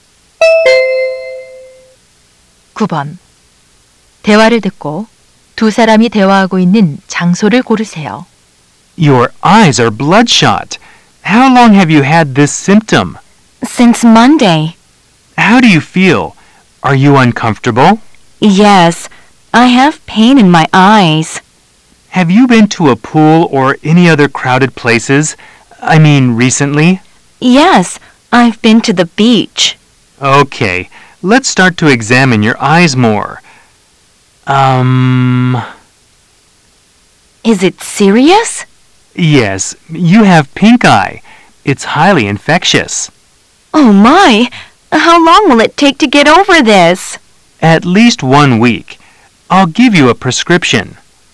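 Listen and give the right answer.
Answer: 안과 병원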